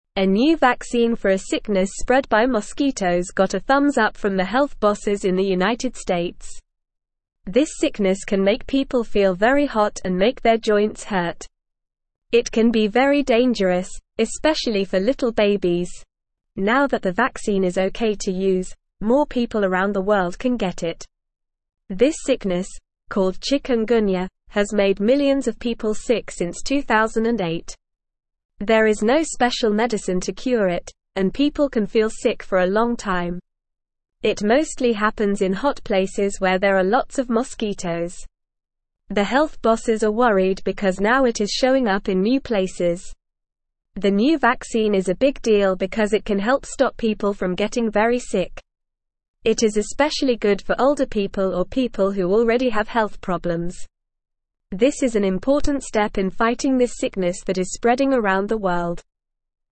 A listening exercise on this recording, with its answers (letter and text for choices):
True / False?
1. Chikungunya has made millions of people sick since 2008 and there is no special medicine to cure it.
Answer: True

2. The new vaccine is not important because it cannot help stop people from getting very sick, especially older people or those with health problems.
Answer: False

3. The sickness, called chikungunya, can make people feel very hot and cause joint pain.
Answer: True

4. The sickness mostly happens in hot places with lots of mosquitoes.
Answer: True

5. Health bosses are not worried because chikungunya is showing up in new places.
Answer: False

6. A new vaccine for a sickness spread by mosquitoes has not been approved in the United States.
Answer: False

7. The vaccine approval means more people around the world can get it.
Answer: True

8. The sickness is not very dangerous, especially for little babies.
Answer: False

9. A new vaccine for a sickness spread by (1)______ got a thumbs-up from the health bosses in the United States.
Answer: mosquitoes

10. This sickness can make people (2)______ very hot and make their (3)______ hurt.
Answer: feel

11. This sickness can make people (2)______ very hot and make their (3)______ hurt.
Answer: joints

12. Now that the vaccine is okay to use, more (4)______ around the world can get it.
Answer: people

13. This (5)______, (6)______ chikungunya, has made millions of people sick since 2008.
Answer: sickness

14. This (5)______, (6)______ chikungunya, has made millions of people sick since 2008.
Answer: called

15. There is no special medicine to cure it, and people can feel (7)______ for a long time.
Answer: sick

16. It mostly (8)______ in hot (9)______ where there are lots of mosquitoes.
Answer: happens

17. It mostly (8)______ in hot (9)______ where there are lots of mosquitoes.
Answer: places

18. The new vaccine is a big deal because it can help (10)______ people from getting very sick.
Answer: stop

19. It is especially good for (11)______ people or people who already have health (12)______.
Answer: older

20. It is especially good for (11)______ people or people who already have health (12)______.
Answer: problems

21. What is the sickness spread by mosquitoes that the new vaccine is for?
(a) Malaria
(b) Dengue fever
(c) Zika virus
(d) Chikungunya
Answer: (d) Chikungunya

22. Why is the new vaccine important?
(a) It can cure the sickness completely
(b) It can only be used by little babies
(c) It can help stop people from getting very sick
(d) It is not effective against the sickness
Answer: (c) It can help stop people from getting very sick

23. Since when has chikungunya made millions of people sick?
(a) 2010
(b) 2015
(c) 2008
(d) 2020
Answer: (c) 2008

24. What is one of the symptoms of chikungunya?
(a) Making people feel very hot and making their joints hurt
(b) Causing a runny nose and cough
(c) Giving people a rash all over their body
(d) Making people feel very cold and sleepy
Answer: (a) Making people feel very hot and making their joints hurt

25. Where does chikungunya mostly happen?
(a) Cold places with lots of snow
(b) Hot places with lots of mosquitoes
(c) Dry places with no water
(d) High places with mountains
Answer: (b) Hot places with lots of mosquitoes

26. Who is the new vaccine especially good for?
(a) Teenagers who are very active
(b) Babies who are just born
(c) Athletes who are in good shape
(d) Older people or people who already have health problems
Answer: (d) Older people or people who already have health problems

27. Why are health bosses worried about chikungunya?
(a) It is showing up in new places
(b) It is easy to cure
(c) It only affects a small number of people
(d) It only affects healthy young adults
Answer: (a) It is showing up in new places

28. What is the new vaccine a big deal?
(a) It is very expensive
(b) It is an important step in fighting the sickness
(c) It is only for people in the United States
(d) It is not effective against the sickness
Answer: (b) It is an important step in fighting the sickness

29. What kind of sickness is the new vaccine for?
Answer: The new vaccine is for a sickness spread by mosquitoes called chikungunya.

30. How does this sickness make people feel?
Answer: This sickness can make people feel very hot and make their joints hurt.

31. Who said the new vaccine is okay to use?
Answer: The health bosses in the United States said the new vaccine is okay to use.

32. Since what year has the sickness called chikungunya made people sick?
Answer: The sickness called chikungunya has made people sick since 2008.

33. Where does this sickness mostly happen?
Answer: This sickness mostly happens in hot places where there are lots of mosquitoes.

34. Who will benefit a lot from the new vaccine?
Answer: Older people or people who already have health problems will benefit a lot from the new vaccine.

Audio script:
A new vaccine for a sickness spread by mosquitoes got a thumbs-up from the health bosses in the United States. This sickness can make people feel very hot and make their joints hurt. It can be very dangerous, especially for little babies. Now that the vaccine is okay to use, more people around the world can get it.
This sickness, called chikungunya, has made millions of people sick since 2008. There is no special medicine to cure it, and people can feel sick for a long time. It mostly happens in hot places where there are lots of mosquitoes. The health bosses are worried because now it is showing up in new places.
The new vaccine is a big deal because it can help stop people from getting very sick. It is especially good for older people or people who already have health problems. This is an important step in fighting this sickness that is spreading around the world.

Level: Level 2